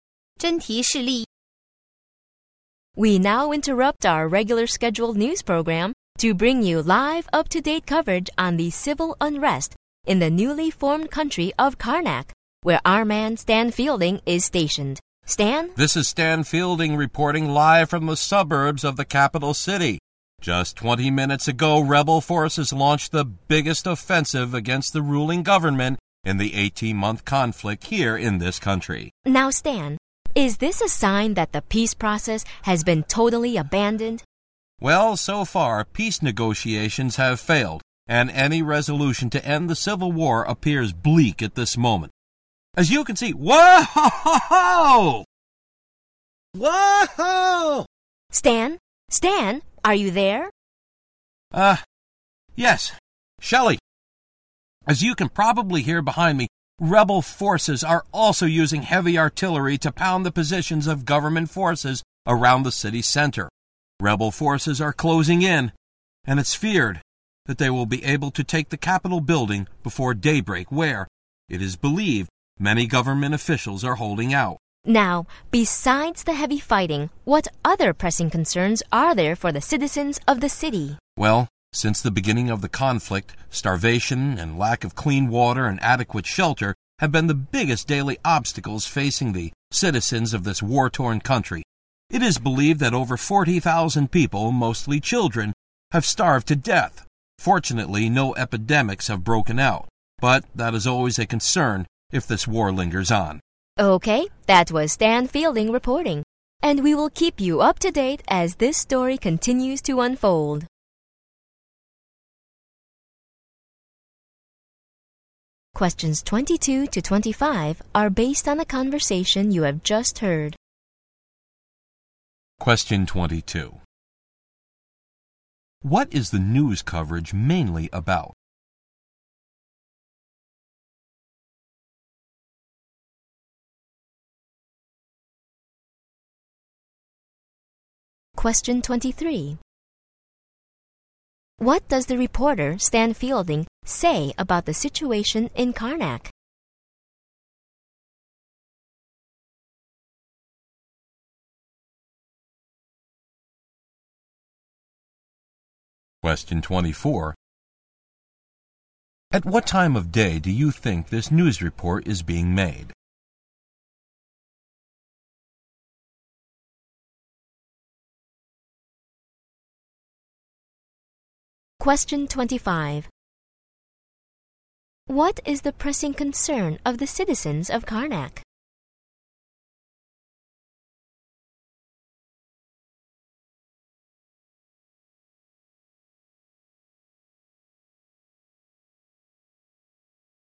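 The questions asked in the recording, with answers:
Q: What is the news coverage mainly about?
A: The civil unrest / civil war in Karnak

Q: What is the pressing concern of the citizens of Karnak?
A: Starvation, lack of clean water and adequate shelter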